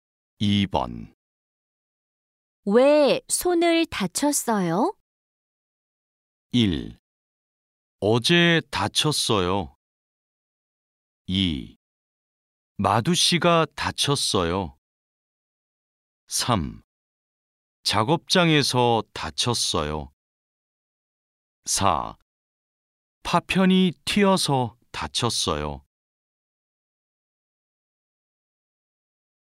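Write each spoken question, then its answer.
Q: 왜 손을 다쳤어요?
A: 4: 파편이 튀어서 다쳤어요.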